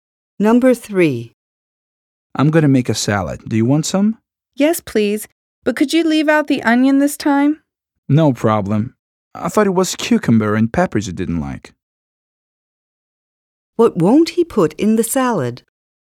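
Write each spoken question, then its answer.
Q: What won't he put in the salad?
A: Onion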